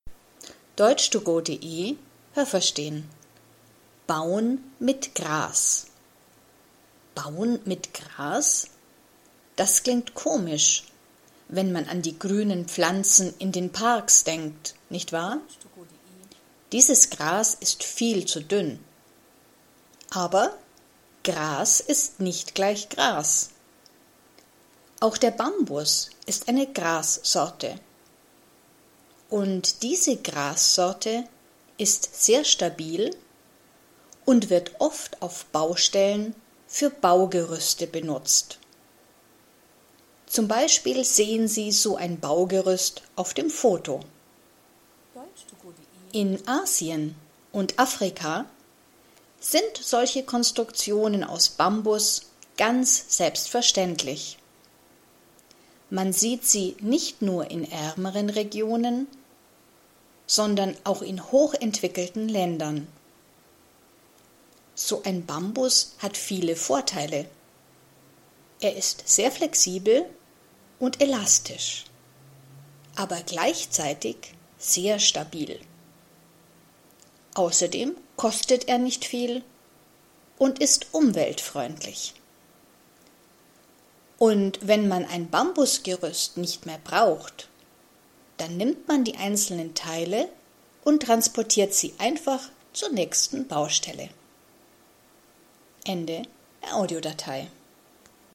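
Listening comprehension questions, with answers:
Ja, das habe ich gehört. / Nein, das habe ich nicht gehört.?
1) Auch Gras in den Parks kann man beim Bauen benutzen. Haben Sie das gehört? Stimmt diese Aussage?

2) Bambus ist auch eine Grassorte. Haben Sie das gehört? Stimmt diese Aussage?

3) In Asien und Afrika benutzt man beim Bauen oft Bambus. Haben Sie das gehört? Stimmt diese Aussage?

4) Bambus nimmt man beim Bauen nur in armen Ländern. Haben Sie das gehört? Stimmt diese Aussage?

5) Bambus ist sehr flexibel und gleichzeitig stabil. Haben Sie das gehört? Stimmt diese Aussage?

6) Bambus ist teuer. Haben Sie das gehört? Stimmt diese Aussage?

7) Man kann eine Bambus-Konstruktion nur einmal benutzen. Haben Sie das gehört? Stimmt diese Aussage?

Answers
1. Nein, das habe ich nicht gehört.
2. Ja, das habe ich gehört.
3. Ja, das habe ich gehört.
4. Nein, das habe ich nicht gehört.
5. Ja, das habe ich gehört.
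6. Nein, das habe ich nicht gehört.
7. Nein, das habe ich nicht gehört.

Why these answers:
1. Man kann es nicht verwenden, denn es ist zu dünn.
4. Man nimmt ihn auch in hochentwickelten Ländern.
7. Man kann ein Bambus-Gerüst öfters benutzen.

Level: A2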